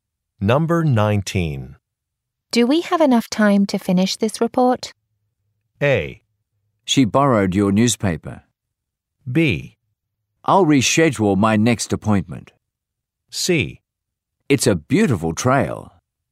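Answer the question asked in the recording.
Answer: B: I'll reschedule my next appointment.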